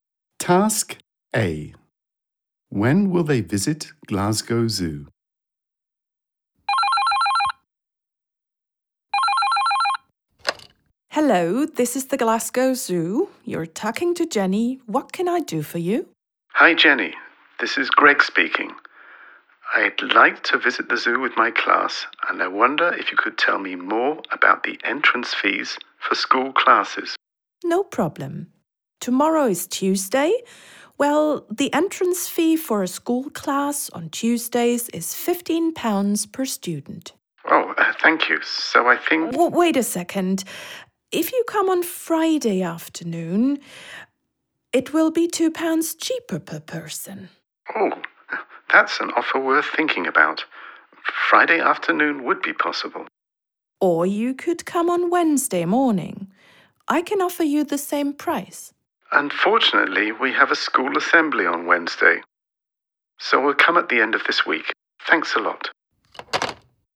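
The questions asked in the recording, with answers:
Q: When will they visit Glasgow Zoo?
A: On Friday afternoon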